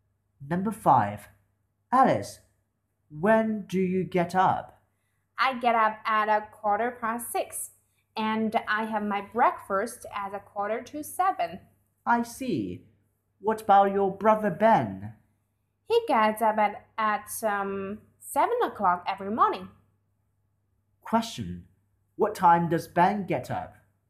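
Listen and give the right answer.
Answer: At 7 o'clock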